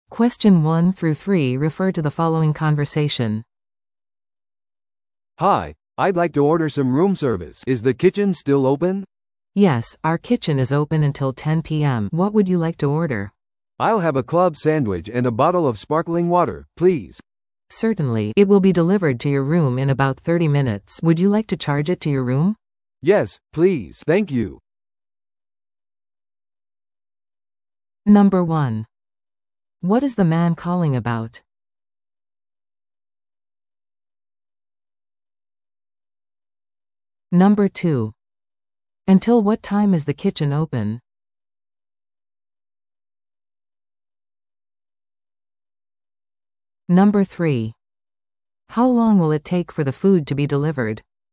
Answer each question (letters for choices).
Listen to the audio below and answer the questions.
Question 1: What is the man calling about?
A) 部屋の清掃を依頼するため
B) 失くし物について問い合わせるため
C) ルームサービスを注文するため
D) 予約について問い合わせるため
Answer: C

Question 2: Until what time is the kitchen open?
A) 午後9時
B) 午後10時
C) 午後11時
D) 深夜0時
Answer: B

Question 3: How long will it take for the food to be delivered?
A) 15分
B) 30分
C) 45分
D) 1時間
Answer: B